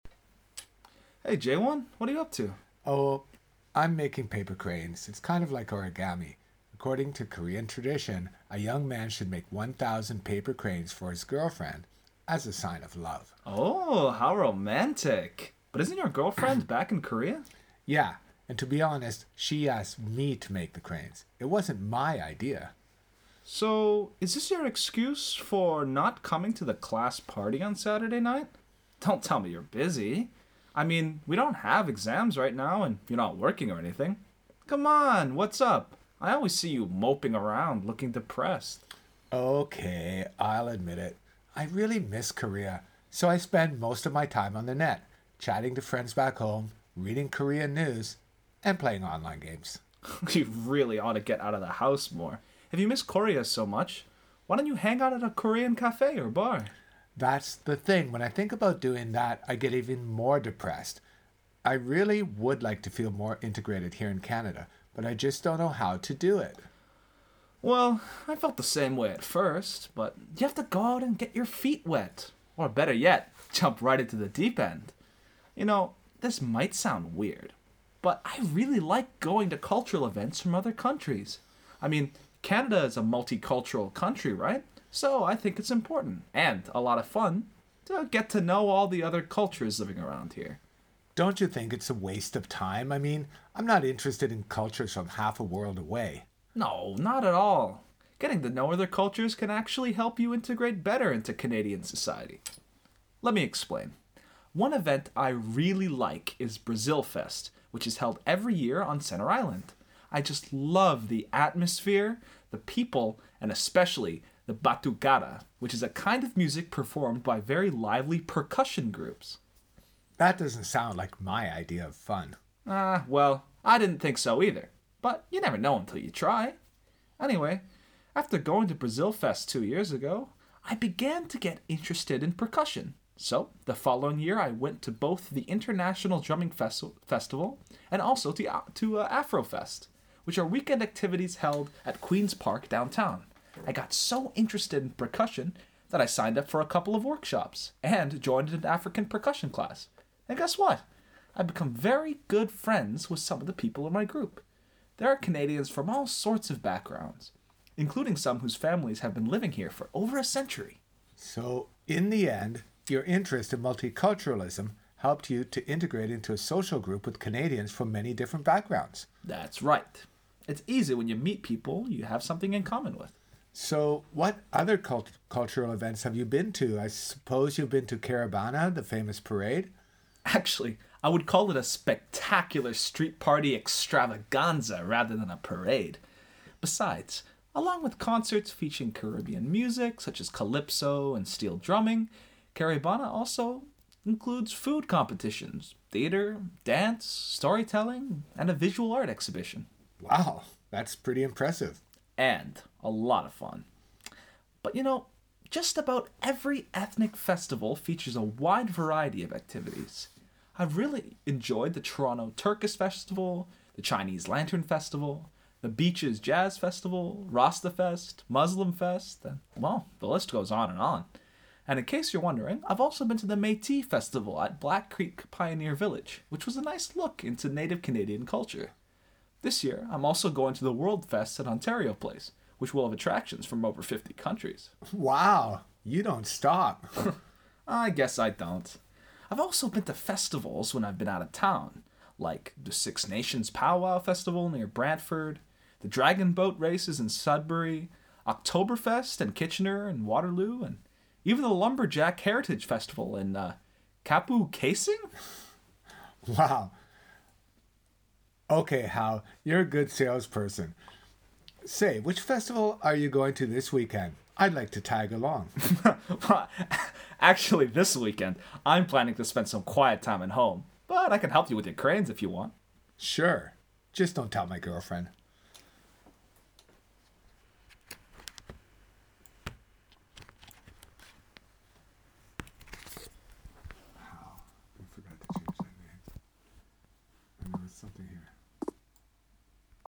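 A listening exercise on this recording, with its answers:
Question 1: What is the main topic of the conversation?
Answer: Integrating into Canadian society by going to cultural events and festivals

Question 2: Why are Hao and Jaewon talking to each other?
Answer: Hao asks what Jaewon is doing and why he isn't coming to the class party

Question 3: What problem is Jaewon experiencing?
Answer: He misses Korea, feels depressed and doesn't feel integrated in Canada

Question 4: How does Jaewon feel about his life in Canada overall?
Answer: Unhappy and homesick; he'd like to feel more integrated but doesn't know how

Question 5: How does Hao feel about living in Canada?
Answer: He feels integrated and enjoys it

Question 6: What is Hao's attitude toward trying new cultural experiences?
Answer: Very positive; he thinks it's important and fun and you never know until you try

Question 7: What is Hao mainly trying to do in this conversation?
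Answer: Encourage Jaewon to get out and go to cultural events to integrate

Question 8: Why doesn't Jaewon want to go to the class party at first?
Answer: He is busy making paper cranes for his girlfriend and feels depressed, missing Korea

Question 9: What is the main difference between Hao's and Jaewon's lifestyles?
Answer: Hao goes out to many festivals and events; Jaewon stays home online with friends in Korea

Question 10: How does Hao suggest Jaewon can improve his situation?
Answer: By getting out and going to multicultural events and festivals to meet people

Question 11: Does Jaewon change his attitude by the end of the conversation?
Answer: Yes, he wants to tag along to a festival

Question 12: What decision do they make at the end?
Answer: Hao will stay home this weekend and help Jaewon make his cranes

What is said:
Hao: Hey, Jaewon, what are you up to?
Jaewon : Oh, I'm making paper cranes. 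It's kind of like origami. According to Korean tradition, a young man should make 1,000 paper cranes for his girlfriend as a sign of love.
Hao: Oh, how romantic! But isn't your girlfriend back in Korea?
Jaewon: Yeah. And to be honest, she asked me to make the cranes. It wasn't my idea!
Hao: So, is this your excuse for not coming to the class party on Saturday night? Don't tell me you're busy. I mean, we don't have exams right now, and you're not working or anything. C'mon, what's up? I always see you moping around, looking depressed.
Jaewon: Ok, I'll admit it: I really miss Korea, so I spend most of my time on the Net, chatting to friends back home, reading Korean News, and playing on-line games.
Hao: You really ought to get out of the house more. If you miss Korea so much, why don't you hang out at a Korean café or bar?
Jaewon: That's the thing. When I think about doing that, I get even more depressed. 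I really would like to feel more integrated here in Canada, but I just don't know how to do it.
Hao: Well, I felt the same way at first, but you have to go out and get your feet wet. Or better yet, jump right into the deep end! You know, this might sound weird, but I really like going to cultural events from other countries. I mean, Canada is a multicultural country, right? So, I think it's important, and a lot of fun, to get to know all the other cultures living around here.
Jaewon: Don't you think it's a waste of time? I mean, I'm not interested in cultures from half a world away.
Hao: No, not at all. Getting to know other cultures can actually help you integrate better into Canadian society. Let me explain: one event I really like is Brazilfest, which is held every year on Centre Island. I just love the atmosphere, the people, and especially the batucada, which is a kind of music performed by very lively percussion groups.
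Jaewon: That doesn't sound like my idea of fun.
Hao: Ah... Well, I didn't think so either, but you never know until you try. Anyway, after going to Brazilfest two years ago, I began to get interested in percussion. So, the following year, I went to both the International Drumming Festival and also to Afrofest, which are weekend activities held at Queen's Park downtown. I got so interested in percussion that I signed up for a couple of workshops and joined an African Percussion class. And guess what? I've become very good friends with some of the people in my group. They are Canadians from all sorts of backgrounds, including some whose families have been living here for over a century.
Jaewon: So, in the end, your interest in multiculturalism helped you to integrate into a social group with Canadians from many different backgrounds.
Hao: That's right. It's easy when you meet people you have something in common with.
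Jaewon: So, what other cultural events have you been to? I suppose you've been to Caribana, the famous parade?
Hao: Actually, I would call it a spectacular street party extravaganza rather than a parade. Besides, along with concerts featuring Caribbean music such as calypso and steel drumming, Caribana also includes food competitions, theatre, dance, storytelling and avvisual art exhibition.
Jaewon: Wow, that's pretty impressive.
But you know, just about every ethnic festival features a wide variety of activities. I've really enjoyed the Toronto Turkish Festival, The Chinese Lantern Festival, The Beaches Jazz Festival, RastaFest, MuslimFest, and well, the list goes on and on. And in case you're wondering, I've also been to the Métis Festival at Black Creek Pioneer Village, which was a nice look into Native Canadian Culture. This year, I'm also going to the World Fest at Ontario Place, which will have attractions from over 50 countries.
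Jaewon: Wow, you don't stop!
Hao: I guess I don't. I've also been to festivals when I've been out of town, like the Six Nations' Pow-WowFestival near Brantford, the Dragon Boat Races in Sudbury,Oktoberfest in Kitchener/Waterloo, and even the Lumberjack Heritage Festival in Kapuskasing.
Jaewon: Wow. You're a good salesperson. Say, which festival are you going to this weekend? I'd like to tag along.
Hao: Actually, this weekend, I'm planning to spend some quiet time at home, but I could help you with your cranes, if you want.
Jaewon: Sure. Just don't tell my girlfriend.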